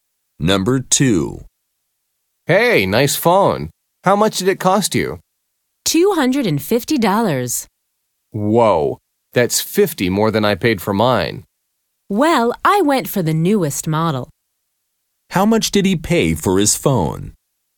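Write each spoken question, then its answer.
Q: How much did he pay for his phone?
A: $200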